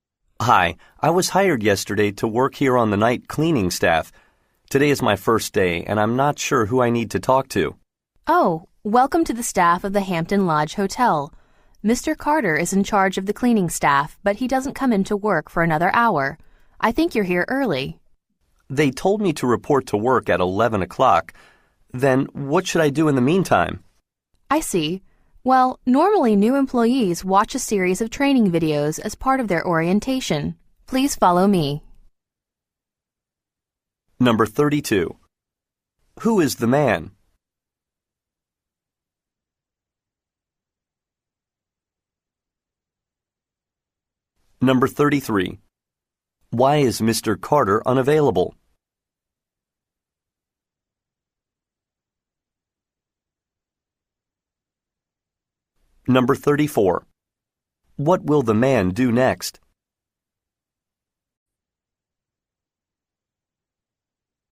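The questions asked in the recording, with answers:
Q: Who is the man?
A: A new member of the hotel's night cleaning staff

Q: Why is Mr. Carter unavailable?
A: He doesn't come in to work for another hour

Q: What will the man do next?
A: Watch training videos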